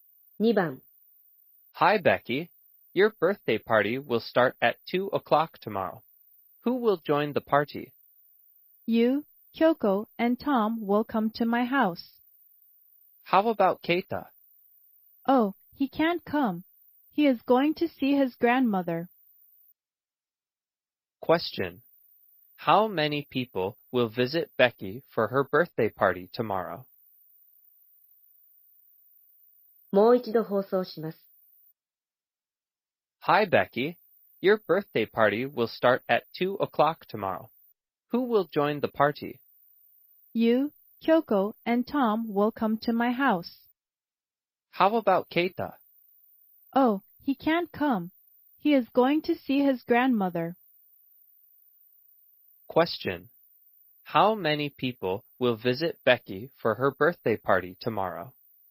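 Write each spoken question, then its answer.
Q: How many people will visit Becky for her birthday party tomorrow?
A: three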